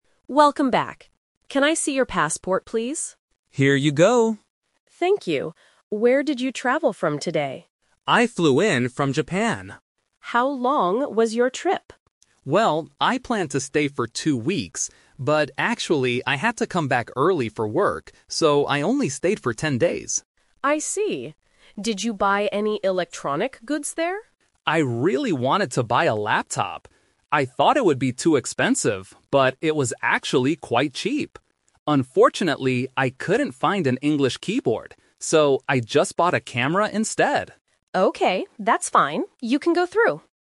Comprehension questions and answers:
Listen to a conversation between a customs officer and a passenger at the airport. Choose the correct answer (A, B, or C) for each question.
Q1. How many days did the passenger actually stay in Japan?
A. Two weeks.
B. Ten days.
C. Seven days.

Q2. What electronic item did the passenger bring back?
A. A laptop.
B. A smartphone.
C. A camera.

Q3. Why didn't the passenger buy a laptop?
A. It was too expensive.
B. It didn't have an English keyboard.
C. The shops were closed.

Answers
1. B. Ten days.
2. C. A camera.
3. B. It didn't have an English keyboard.

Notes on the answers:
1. The passenger says, "...so I only stayed for ten days." Option A is the trap: he "planned" to stay for two weeks, but he had to come back early. Option C is a plausible length for a trip but is not mentioned.
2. The passenger clearly states, "So, I just bought a camera instead." Option A is the trap: he "wanted to buy a laptop", but he didn't buy it. Option B is a plausible electronic good but is never mentioned in the audio.
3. The passenger explains, "Unfortunately, I couldn't find an English keyboard." Option A is the trap: he mentions the word "expensive" because he thought it would be expensive, but he says "it was actually quite cheap." Option C is plausible but not mentioned.

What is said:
Officer: Welcome back. Can I see your passport, please?
Passenger: Here you go.
Officer: Thank you. Where did you travel from today?
Passenger: I flew in from Japan.
Officer: How long was your trip?
Passenger: Well, I planned to stay for two weeks. But actually, I had to come back early for work, so I only stayed for ten days.
Officer: I see. Did you buy any electronic goods there?
Passenger: I really wanted to buy a laptop. I thought it would be too expensive, but it was actually quite cheap! Unfortunately, I couldn't find an English keyboard. So, I just bought a camera instead.

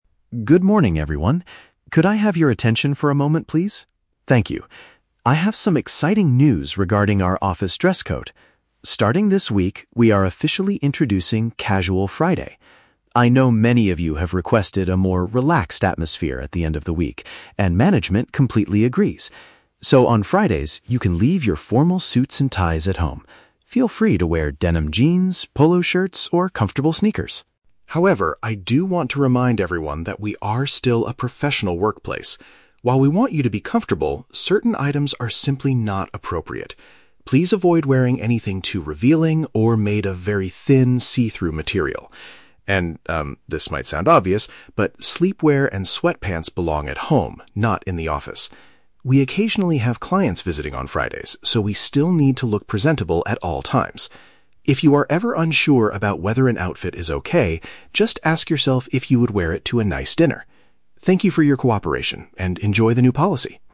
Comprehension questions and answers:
Listen to the announcement from the company director. For each question, choose the correct answer (A, B, or C).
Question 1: What is the main purpose of the director's announcement?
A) To inform staff that the office will close early on Fridays.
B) To introduce a more relaxed clothing policy once a week.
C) To ban the use of formal suits and ties in the workplace.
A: B) To introduce a more relaxed clothing policy once a week.

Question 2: Which of the following items are NOT allowed under the new rules?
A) Denim jeans and sports shoes.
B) Heavy winter coats and scarves.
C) Transparent clothing and pajamas.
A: C) Transparent clothing and pajamas.

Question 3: Why does the director mention going to a "nice dinner"?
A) To invite the employees to eat out with visiting clients.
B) To give staff a standard for judging if their clothes are suitable.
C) To announce a company celebration for the new policy.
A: B) To give staff a standard for judging if their clothes are suitable.

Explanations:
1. The director announces "Casual Friday" and says they agree with having a "more relaxed atmosphere at the end of the week," which matches option B. Option A is plausible but never mentioned. Option C is a trap; the director says you can "leave your formal suits and ties at home" on Fridays, but they are not banned from the workplace entirely.
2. The director explicitly states to avoid "see-through material" (paraphrased as transparent) and "sleepwear" (paraphrased as pajamas). Option A is a trap because jeans and sneakers (sports shoes) are explicitly allowed. Option B is plausible for an office setting but is not mentioned in the audio.
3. The director tells employees that if they are "unsure about whether an outfit is okay" (need a standard to judge), they should ask themselves if they would wear it to a nice dinner. Option A is a trap because the director mentions "clients visiting" right before this, but does not invite anyone to dinner. Option C is plausible but incorrect.

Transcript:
Director: Good morning, everyone. Could I have your attention for a moment, please? Thank you. I have some exciting news regarding our office dress code. Starting this week, we are officially introducing "Casual Friday." I know many of you have requested a more relaxed atmosphere at the end of the week, and management completely agrees. So, on Fridays, you can leave your formal suits and ties at home. Feel free to wear denim jeans, polo shirts, or comfortable sneakers.
However, I do want to remind everyone that we are still a professional workplace. While we want you to be comfortable, certain items are simply not appropriate. Please avoid wearing anything too revealing or made of very thin, see-through material. And, um, this might sound obvious, but sleepwear and sweatpants belong at home, not in the office. We occasionally have clients visiting on Fridays, so we still need to look presentable at all times. If you are ever unsure about whether an outfit is okay, just ask yourself if you would wear it to a nice dinner. Thank you for your cooperation, and enjoy the new policy!

